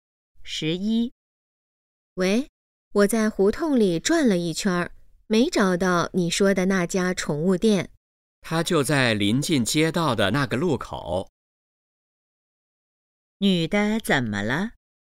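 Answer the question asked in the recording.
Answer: 没找到那家宠物店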